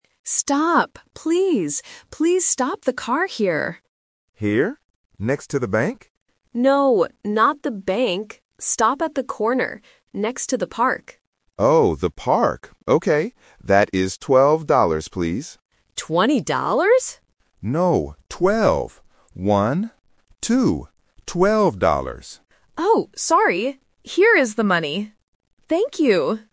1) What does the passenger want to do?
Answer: Stop the car

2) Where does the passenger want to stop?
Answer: Next to the park

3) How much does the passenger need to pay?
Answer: $12

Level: A1